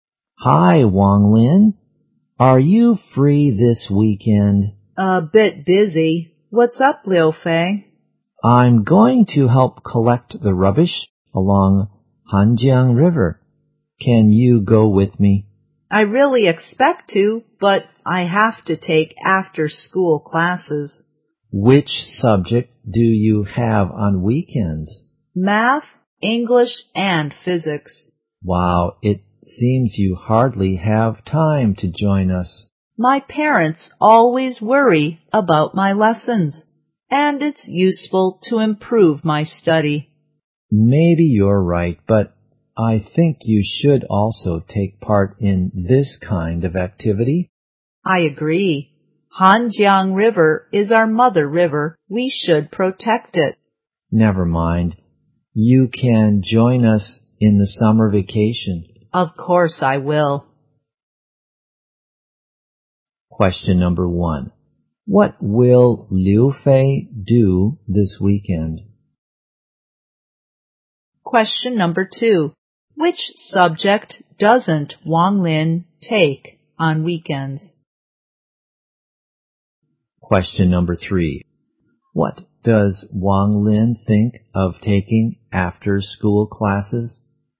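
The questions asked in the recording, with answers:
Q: What will Liu Fei do this weekend?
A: Help collect the rubbish along Hanjiang River

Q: What does Wang Lin think of taking after-school classes?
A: It's useful to improve his study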